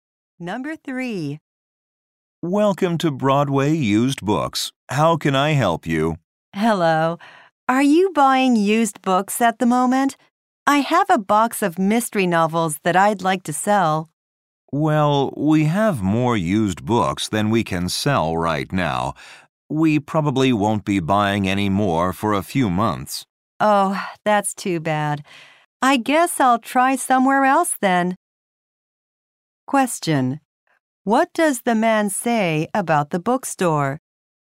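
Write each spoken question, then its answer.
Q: What does the man say about the bookstore?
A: It will not buy used books for a few months.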